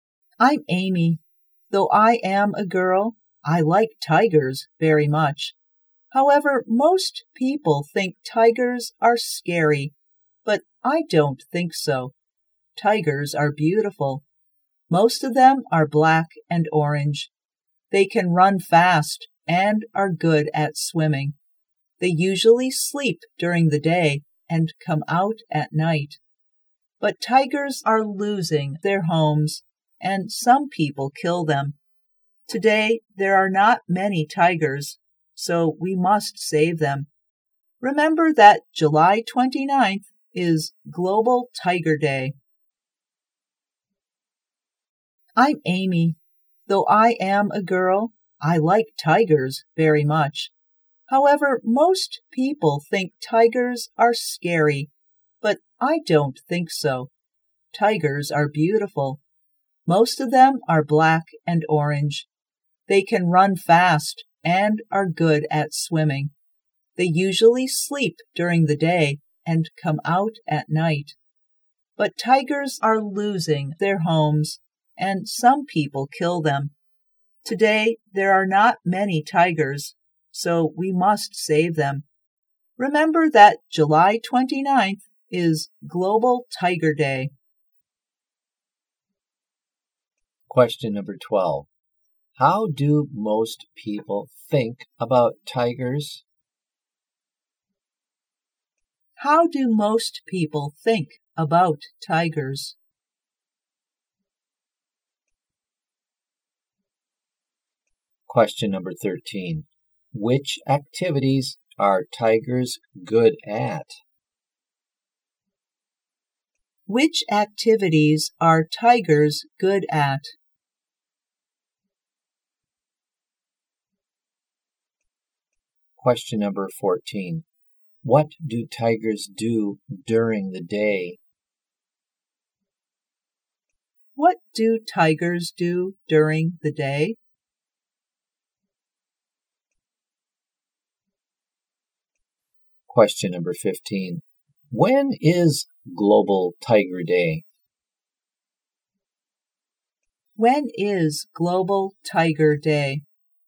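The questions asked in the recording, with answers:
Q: How do most people think about tigers?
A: They think tigers are scary.

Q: Which activities are tigers good at?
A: Running fast and swimming.

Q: What do tigers do during the day?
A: They sleep.

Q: When is Global Tiger Day?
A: July 29th.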